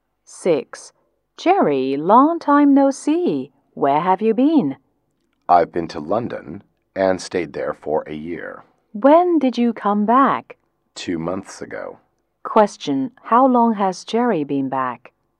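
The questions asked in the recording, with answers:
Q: Question, how long has Jerry been back?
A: 2 months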